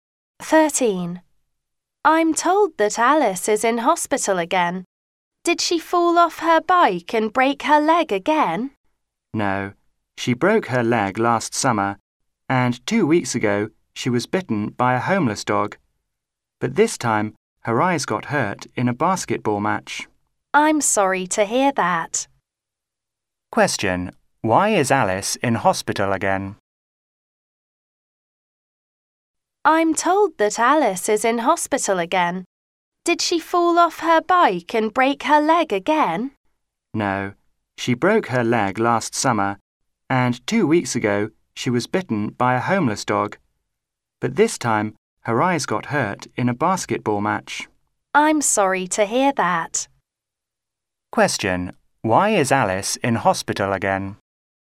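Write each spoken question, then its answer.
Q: Question. Why is Alice in hospital again?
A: Her eyes got hurt in a basketball match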